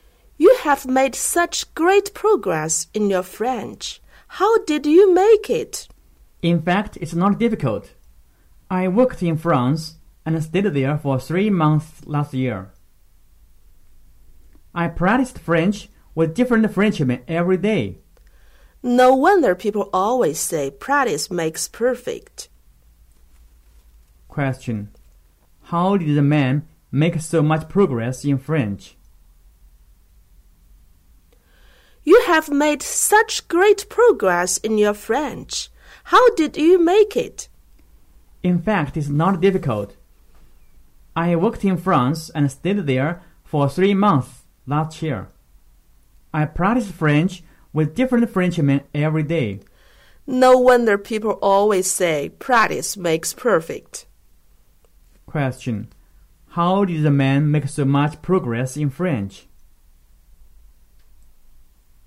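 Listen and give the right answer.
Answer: By practicing French with Frenchmen every day while working in France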